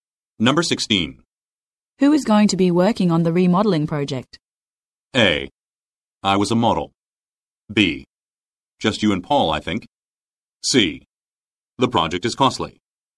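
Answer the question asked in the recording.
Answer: B: Just you and Paul, I think.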